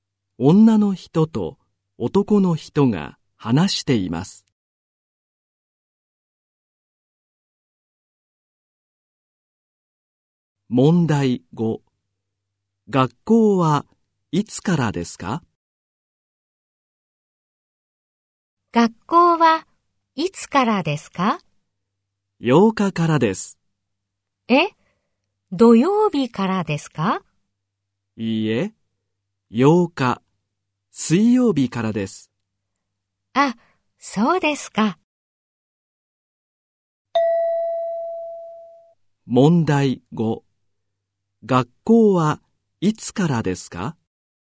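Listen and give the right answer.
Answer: 8日、水曜日から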